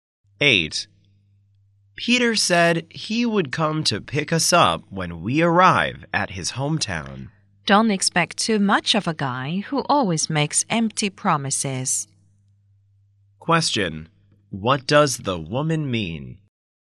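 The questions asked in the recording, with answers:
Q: What does the woman mean?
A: Peter may not keep his promise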